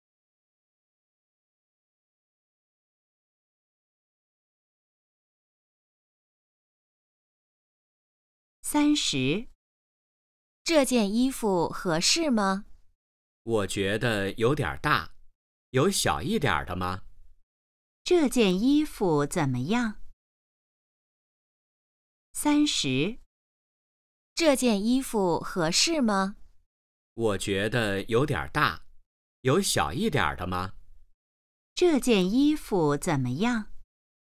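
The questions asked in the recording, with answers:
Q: 这件衣服怎么样?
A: 有点大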